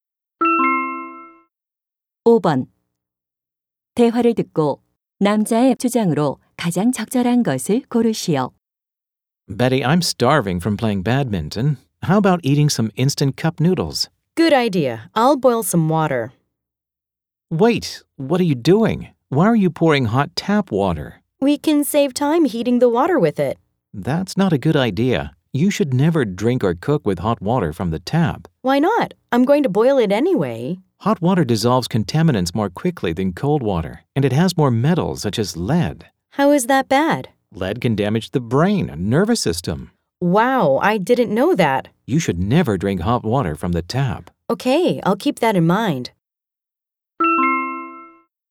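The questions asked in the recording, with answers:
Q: 대화를 듣고 남자의 주장으로 가장 적절한 것을 고르시오.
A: 수돗물 온수를 마시거나 요리에 쓰면 안 된다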